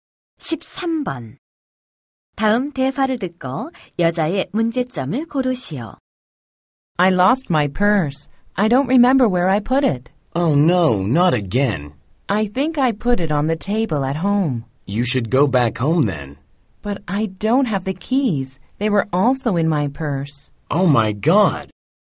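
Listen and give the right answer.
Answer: 지갑(과 열쇠)을 잃어버렸다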